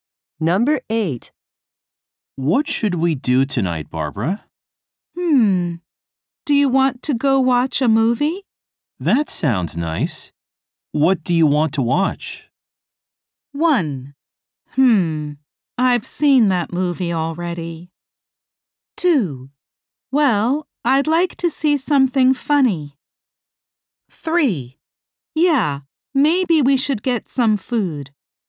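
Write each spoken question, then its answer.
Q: That sounds nice. What do you want to watch?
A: 2: Well, I'd like to see something funny.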